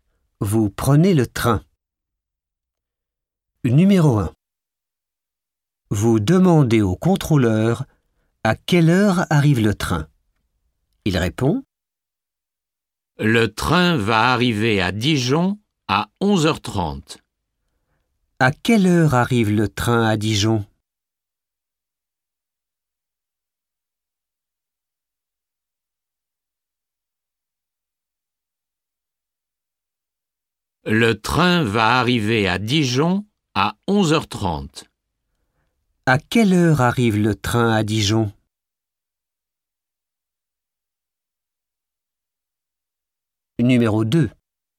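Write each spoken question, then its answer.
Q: À quelle heure arrive le train à Dijon?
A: À 11h30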